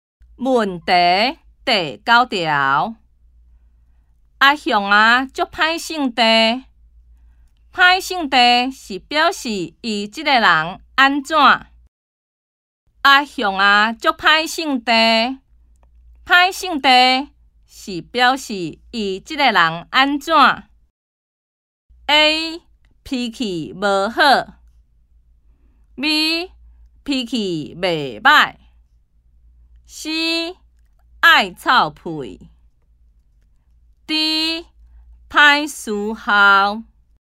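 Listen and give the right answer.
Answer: A: 脾气无好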